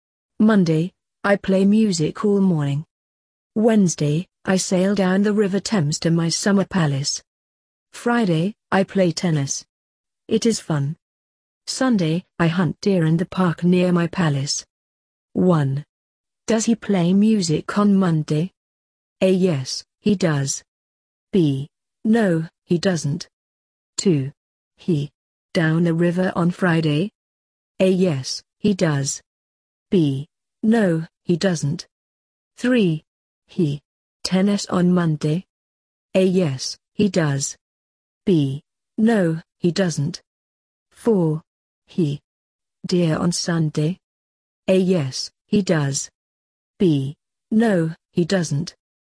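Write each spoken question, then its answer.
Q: Does he play music on Monday?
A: A: Yes, he does.

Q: He. Down the river on Friday?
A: B: No, he doesn't.

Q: He. Tennis on Monday?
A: B: No, he doesn't.

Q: He. Deer on Sunday?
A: A: Yes, he does.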